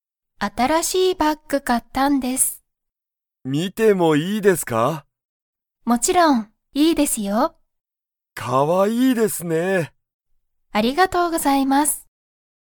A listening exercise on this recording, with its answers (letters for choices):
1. 佐藤さとうさんは、新あたらしいバッグを__。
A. 買(か)った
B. 見(み)た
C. 覚(おぼ)えた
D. 知(し)った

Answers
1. A

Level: Level 1